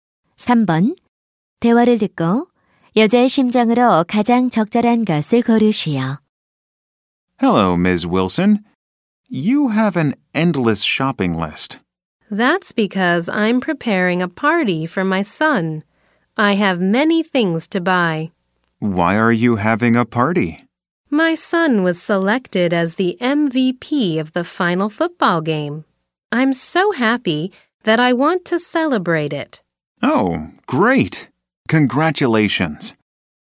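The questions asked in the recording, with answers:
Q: 대화를 듣고 여자의 심정으로 가장 적절한 것을 고르시오.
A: 기쁨, 행복함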